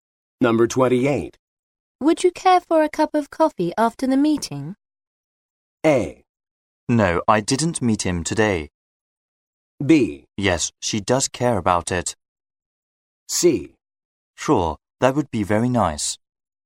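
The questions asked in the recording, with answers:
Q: Would you care for a cup of coffee after the meeting?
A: C: Sure, that would be very nice.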